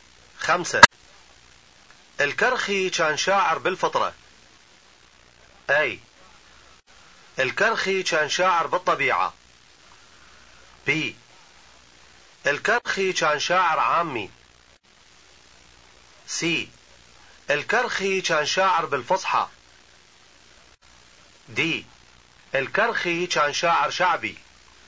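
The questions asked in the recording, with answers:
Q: خمسة. الكرخي كان شاعر بالفطرة.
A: A: الكرخي كان شاعر بالطبيعة.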